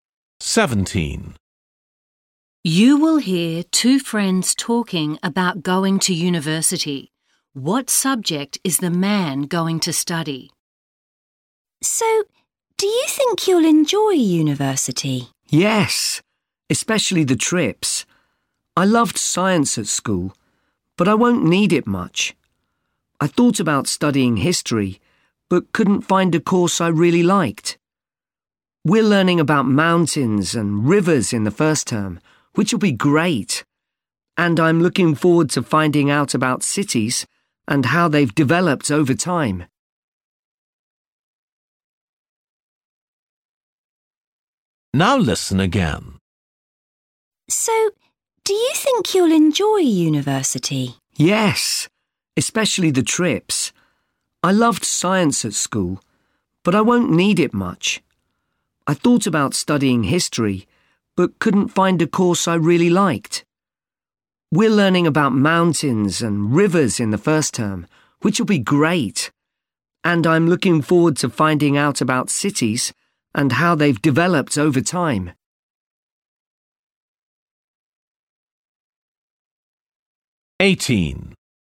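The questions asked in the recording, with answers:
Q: What subject is the man going to study?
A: Geography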